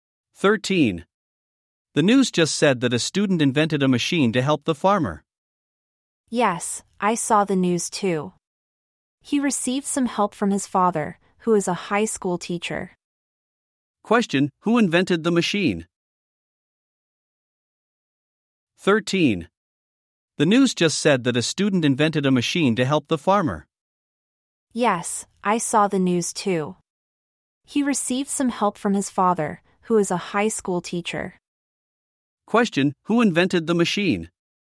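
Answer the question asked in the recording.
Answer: A student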